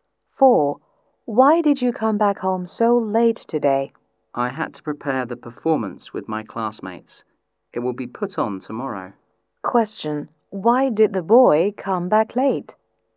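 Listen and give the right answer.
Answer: He had to prepare the performance with his classmates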